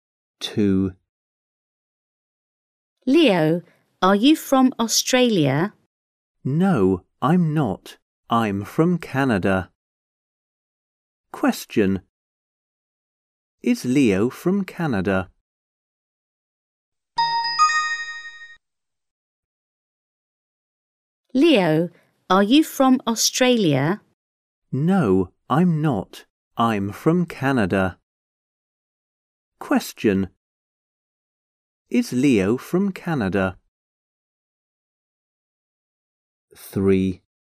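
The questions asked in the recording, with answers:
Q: Is Leo from Canada?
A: Yes, he is.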